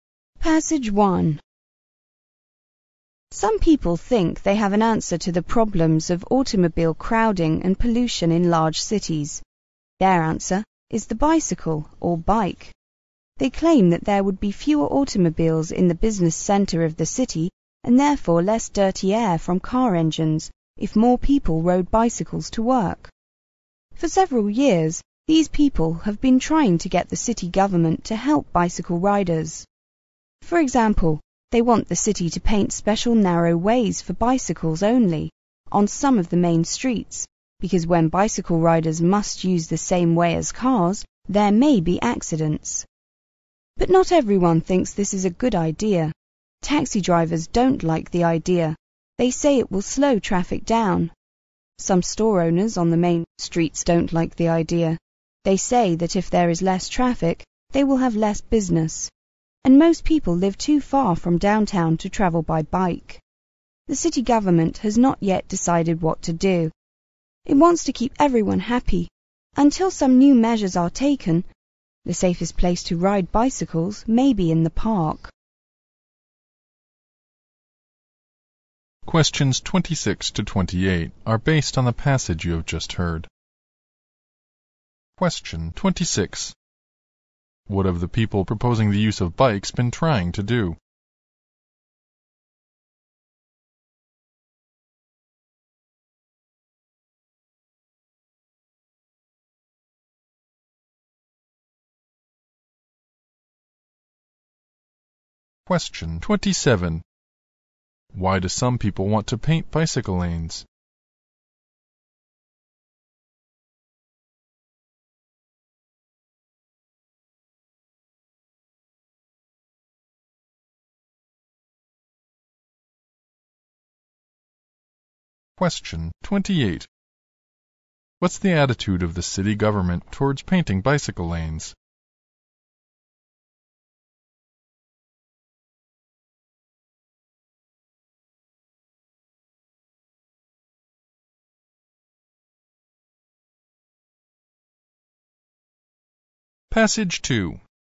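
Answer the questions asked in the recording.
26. Get the city government to help bicycle riders
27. To avoid accidents between bikes and cars
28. Undecided; it wants to keep everyone happy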